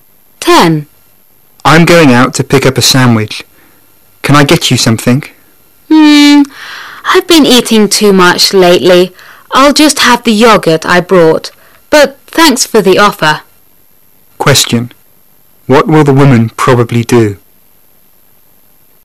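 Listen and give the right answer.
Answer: Eat the yogurt she brought.

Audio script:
[解析] Man: I'm going out to pick up a sandwich. Can I get you something? I've been eating too much lately. I'll just have the yogurt I brought, but thanks for the offer. Question: What will the woman probably do?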